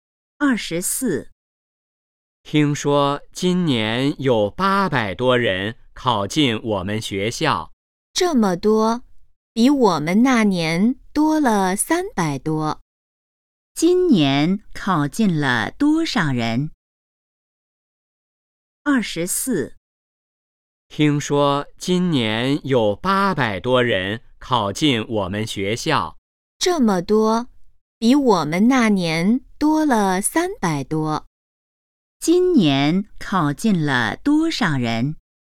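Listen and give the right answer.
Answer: 800多人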